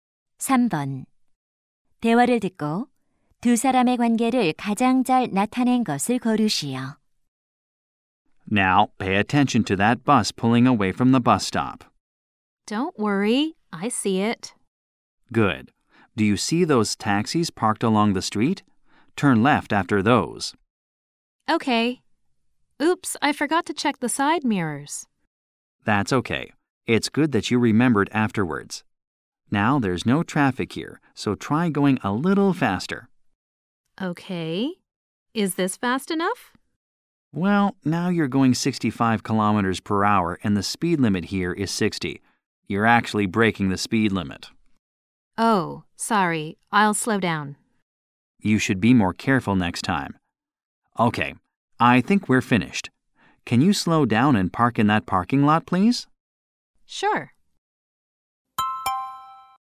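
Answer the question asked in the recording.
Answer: 운전 강사 - 수강생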